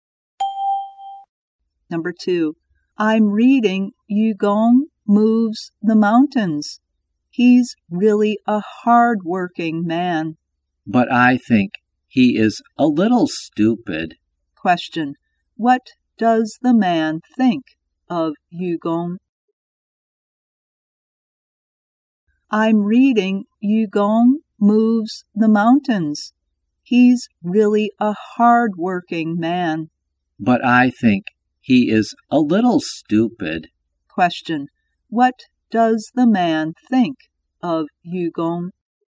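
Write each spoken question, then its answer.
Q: Question. What does the man think of Yugong?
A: He is hard-working but a little stupid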